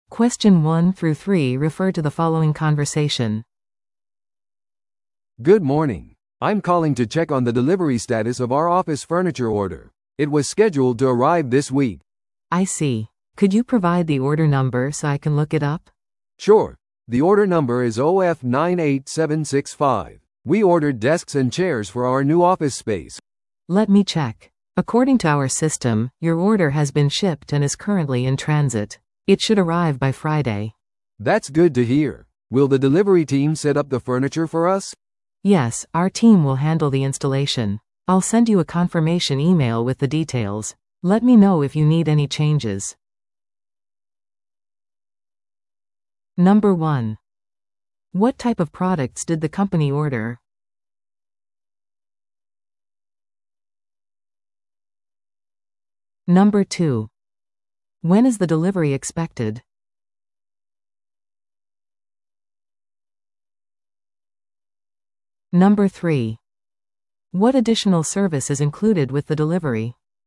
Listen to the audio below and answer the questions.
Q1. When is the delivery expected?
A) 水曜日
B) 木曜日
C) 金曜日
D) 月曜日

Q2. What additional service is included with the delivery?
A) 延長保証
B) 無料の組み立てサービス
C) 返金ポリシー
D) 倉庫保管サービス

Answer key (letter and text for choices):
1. C) 金曜日
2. B) 無料の組み立てサービス

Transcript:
A: "Good morning. I'm calling to check on the delivery status of our office furniture order. It was scheduled to arrive this week."
B: "I see. Could you provide the order number so I can look it up?"
A: "Sure, the order number is OF98765. We ordered desks and chairs for our new office space."
B: "Let me check. According to our system, your order has been shipped and is currently in transit. It should arrive by Friday."
A: "That's good to hear. Will the delivery team set up the furniture for us?"
B: "Yes, our team will handle the installation. I'll send you a confirmation email with the details. Let me know if you need any changes."